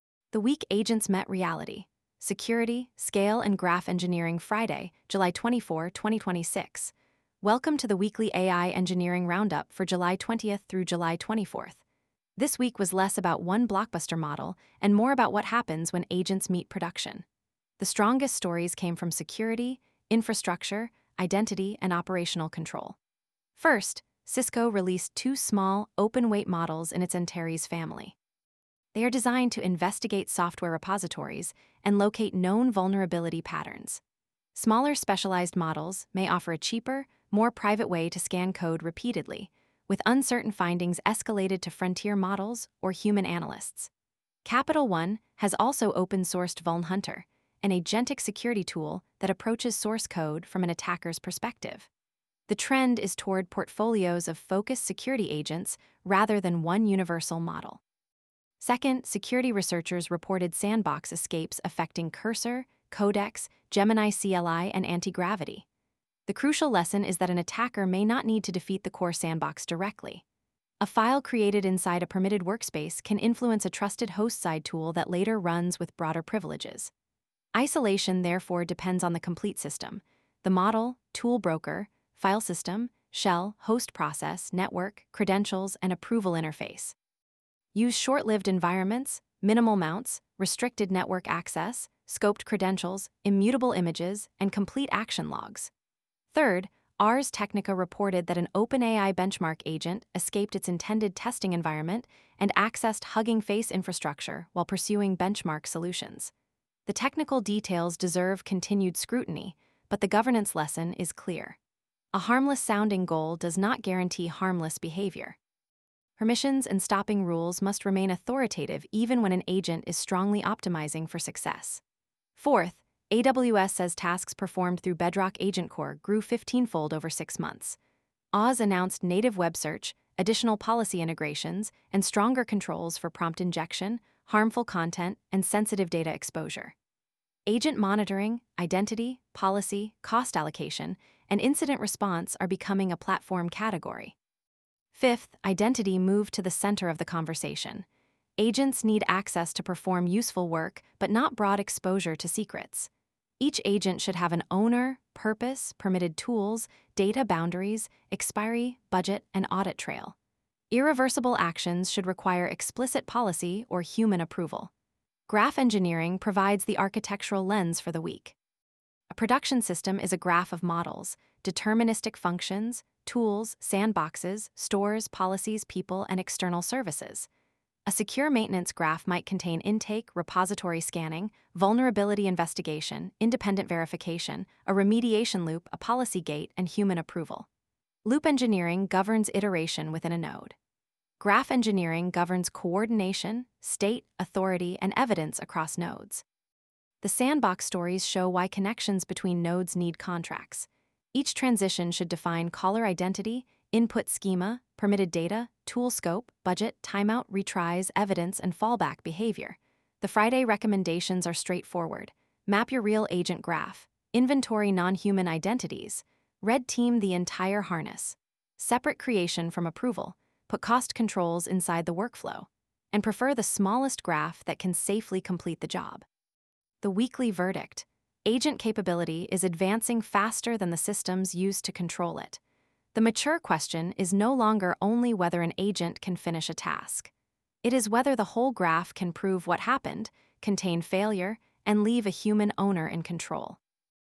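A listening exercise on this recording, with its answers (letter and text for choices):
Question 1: What was the strongest theme in AI engineering news this week?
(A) Agent security, governance, identity, and production operations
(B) A complete end to AI model development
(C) The disappearance of coding agents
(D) A return to autocomplete-only tools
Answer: (A) Agent security, governance, identity, and production operations

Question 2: Why are Cisco's Antares models notable?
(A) They are smaller open-weight models specialised for vulnerability investigation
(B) They are general-purpose image generators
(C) They require source code to be publicly hosted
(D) They automatically deploy every proposed fix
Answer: (A) They are smaller open-weight models specialised for vulnerability investigation

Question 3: What did the coding-agent sandbox reports demonstrate?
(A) Trusted host-side components can undermine an otherwise restricted sandbox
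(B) All sandbox implementations are mathematically perfect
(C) Agents cannot write files inside workspaces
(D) Network controls are no longer necessary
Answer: (A) Trusted host-side components can undermine an otherwise restricted sandbox

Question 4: How do Loop Engineering and Graph Engineering relate?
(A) Loops govern iteration inside nodes; graphs govern coordination and authority across nodes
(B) Graph Engineering eliminates every loop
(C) Loop Engineering is only used for databases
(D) They are unrelated to agent systems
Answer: (A) Loops govern iteration inside nodes; graphs govern coordination and authority across nodes

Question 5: Which practice best controls production agent risk?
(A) Typed transitions, scoped identities, independent evidence, budgets, and human gates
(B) Giving every node unrestricted credentials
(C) Allowing infinite retries and parallel branches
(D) Letting an agent approve its own deployment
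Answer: (A) Typed transitions, scoped identities, independent evidence, budgets, and human gates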